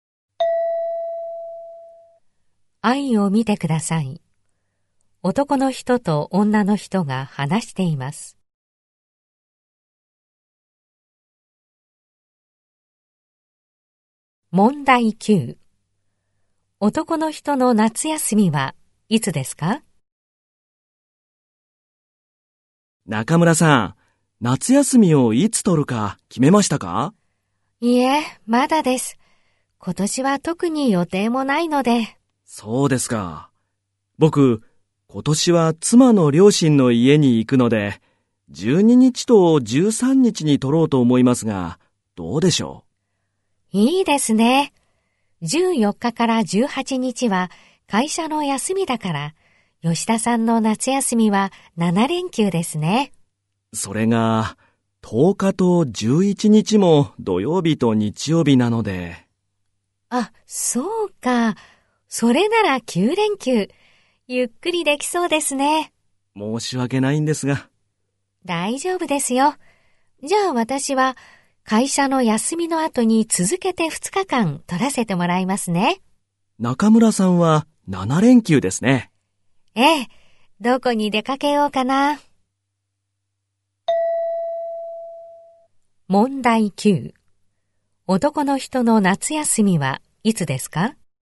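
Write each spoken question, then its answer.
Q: 男の人の夏休みはいつですか?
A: 10日から18日まで(9連休)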